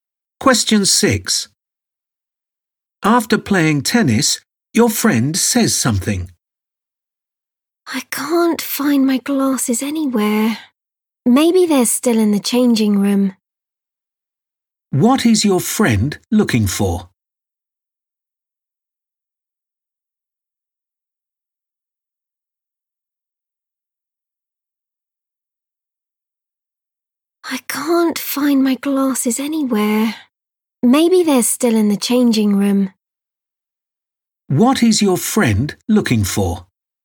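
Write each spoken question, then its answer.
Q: What is your friend looking for?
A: glasses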